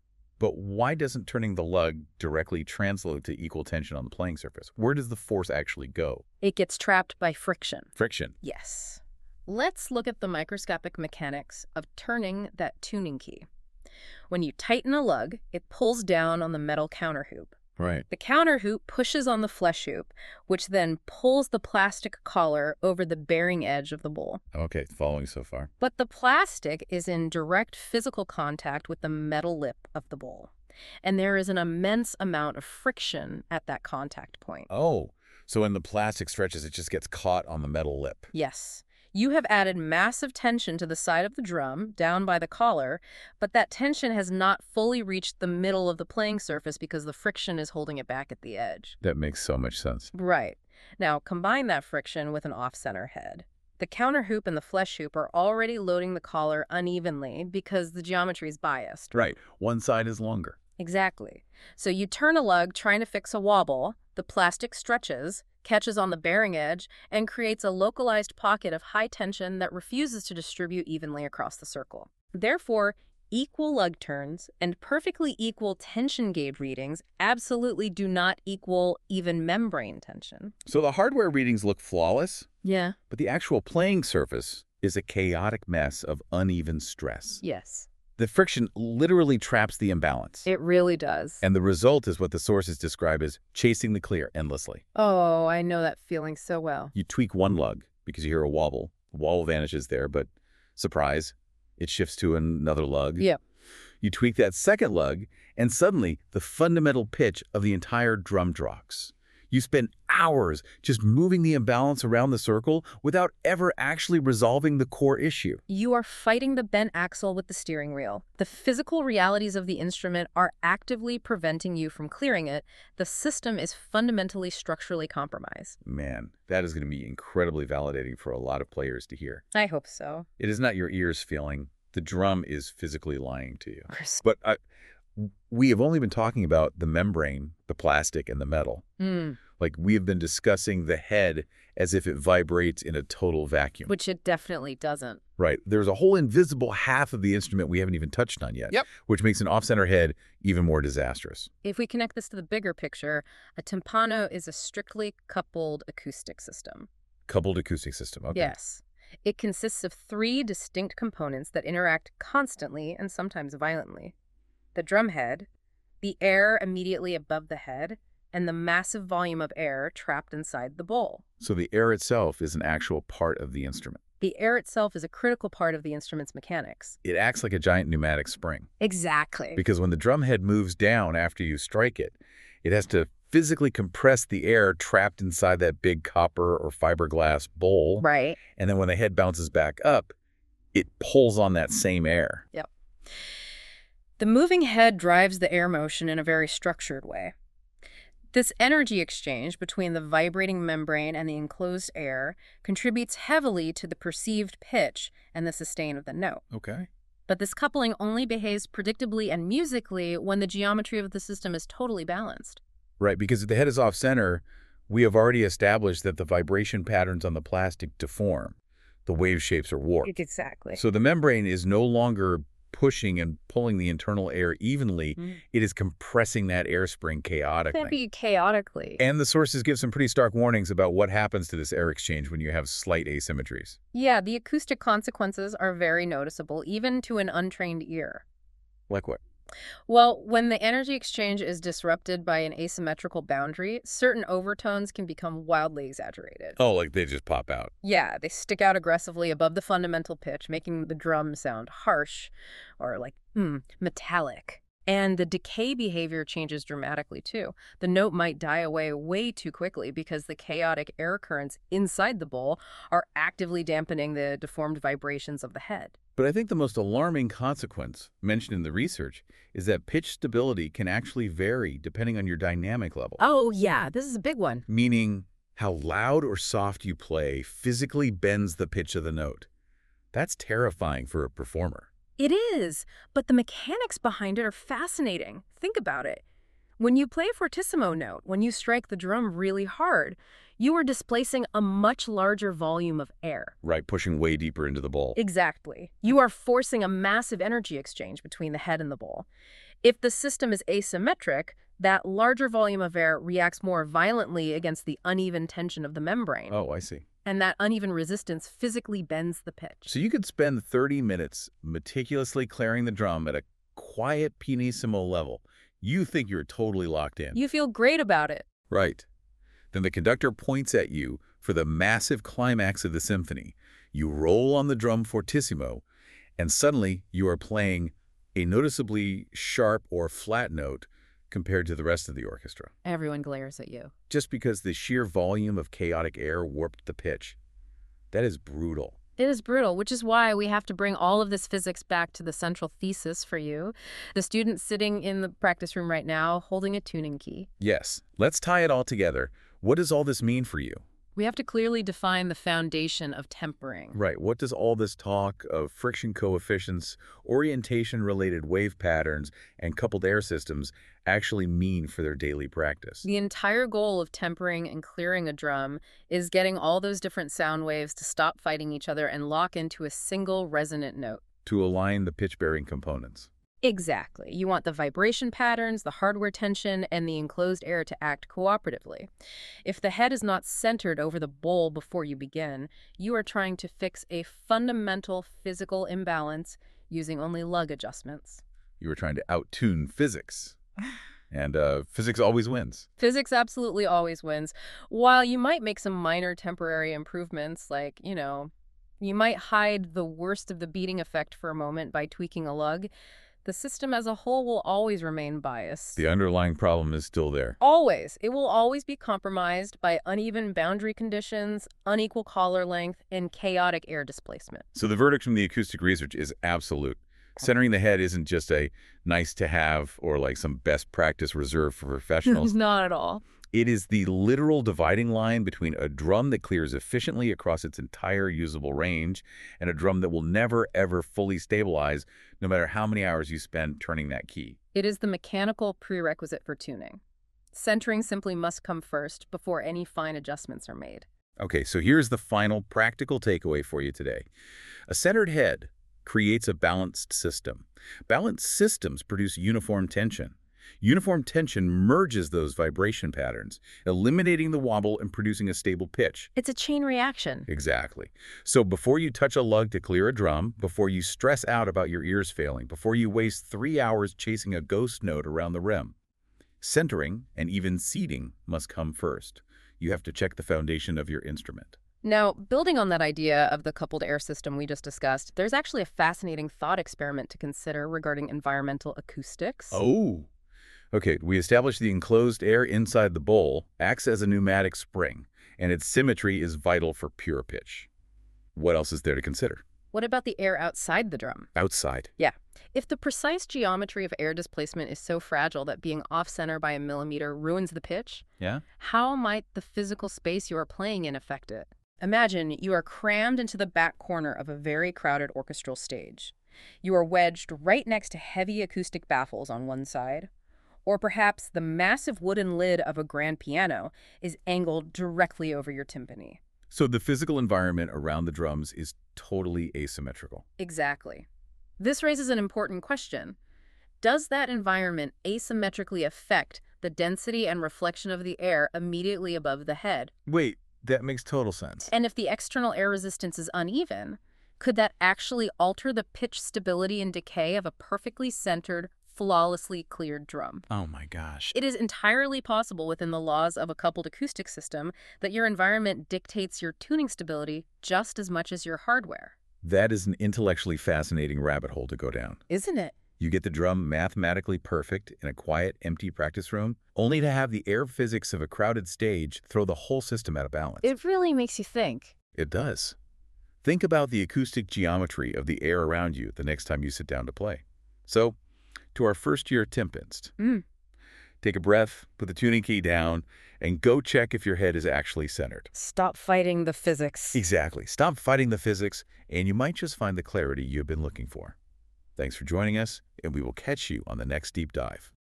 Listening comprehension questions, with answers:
Select a question to reveal the answer. Questions invite recall, analysis, application, or evaluation suitable for students and professionals.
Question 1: What three elements make up the coupled vibrating system of a timpano?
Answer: The head, the air above the head, and the air trapped inside the bowl.

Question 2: What audible consequences can result from energy exchange asymmetries in an off-center drum?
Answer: Certain overtones may become exaggerated, decay behavior may change, or pitch stability may vary with dynamic level.

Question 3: What is the practical takeaway of this article in a single sentence?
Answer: For a timpano to clear reliably and speak with a focused pitch center, centering and even seating must come first.